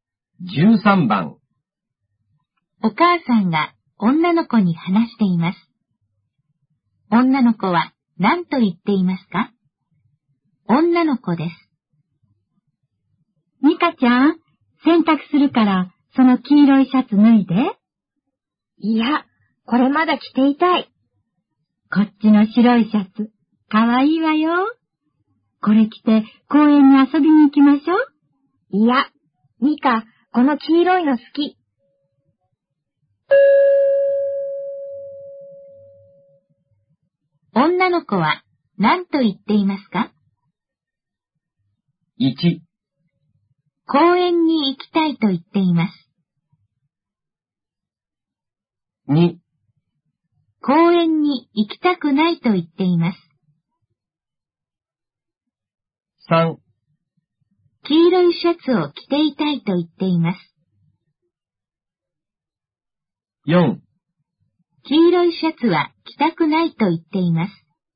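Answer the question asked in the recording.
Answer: 3: 黄色いシャツを着ていたいと言っています。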